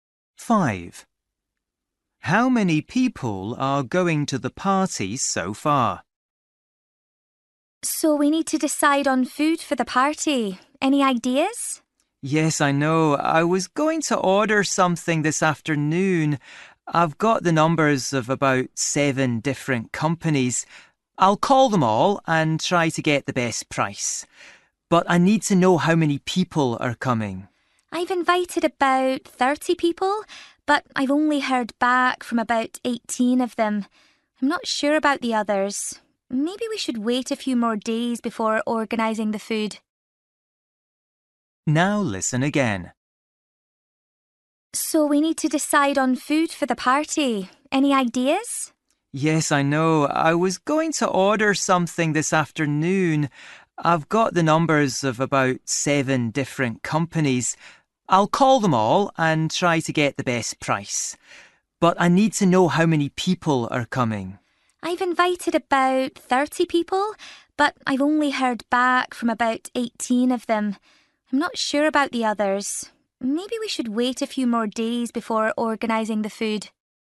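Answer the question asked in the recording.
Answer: About 18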